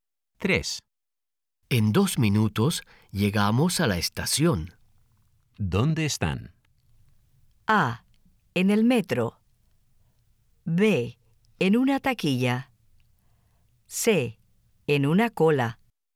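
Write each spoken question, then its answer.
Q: ¿Dónde están?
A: A: En el metro.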